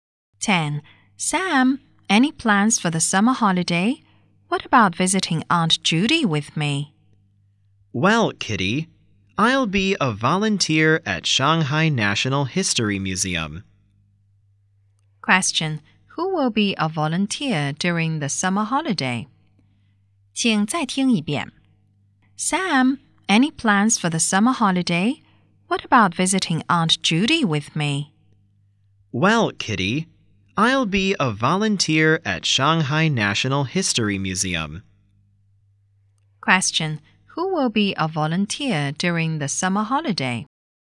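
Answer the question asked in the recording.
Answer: Sam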